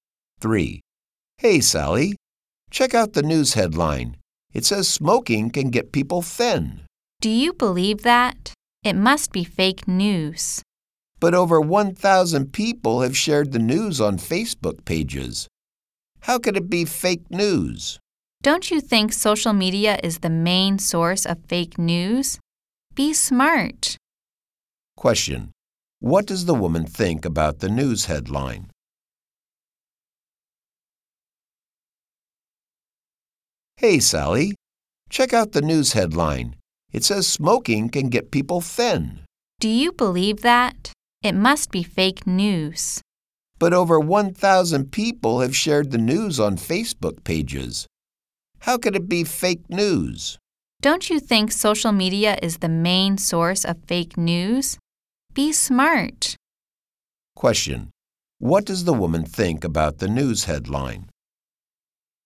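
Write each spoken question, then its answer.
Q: What does the woman think about the news headline?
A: She thinks it must be fake news.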